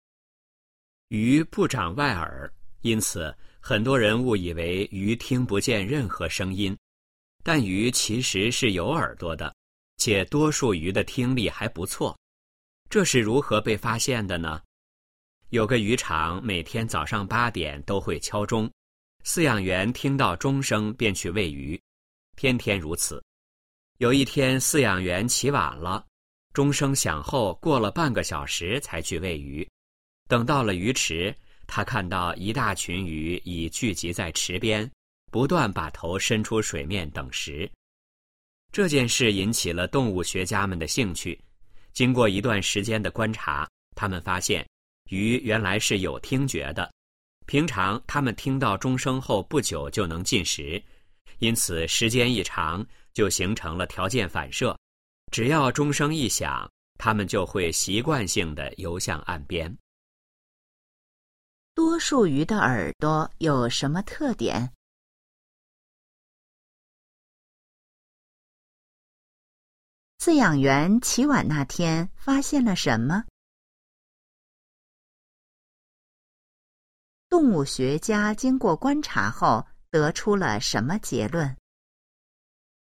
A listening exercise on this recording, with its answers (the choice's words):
请选出正确答案。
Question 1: 多数鱼的耳朵有什么特点?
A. 是圆形的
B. 听力很差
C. 是半透明的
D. 没长在外面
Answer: 没长在外面

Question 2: 饲养员起晚那天发现了什么?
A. 鱼变少了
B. 很多鱼跳上了岸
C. 鱼食被人拿走了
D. 鱼己在池边等食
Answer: 鱼己在池边等食

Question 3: 动物学家经过观察后,得出了什么结论?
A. 鱼能听到声音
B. 鱼用动作交流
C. 鱼能闻到各种味道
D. 高温会使鱼呼吸困难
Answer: 鱼能听到声音

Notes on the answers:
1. 鱼不长外耳,因此,很多人误以为鱼听不见任何声音。但鱼其实是有耳朵的,且多数鱼的听力还不错。这是如何被发现的呢?

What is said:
鱼不长外耳,因此,很多人误以为鱼听不见任何声音。但鱼其实是有耳朵的,且多数鱼的听力还不错。这是如何被发现的呢?
有个渔场每天早上八点都会敲钟,饲养员听到钟声便去喂鱼,天天如此。有一天饲养员起晚了,钟声响后过了半个小时才去喂鱼。等到了鱼池,他看到一大群鱼己聚集在池边,不断把头伸出水面等食。
这件事引起了动物学家们的兴趣,经过一段时间的观察,他们发现鱼原来是有听觉的。平常它们听到钟声后不久就能进食,因此时间一长就形成了条件反射,只要钟声一响,它们就会习惯性地游向岸边。

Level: 汉语水平考试(HSK)五级